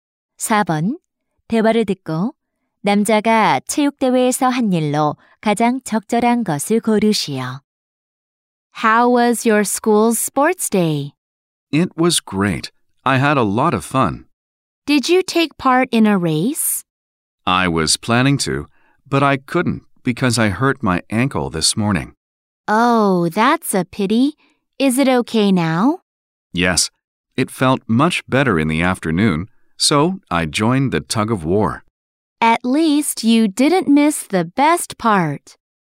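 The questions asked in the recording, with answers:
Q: 대화를 듣고 남자가 체육대회에서 한 일로 가장 적절한 것을 고르시오.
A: 줄다리기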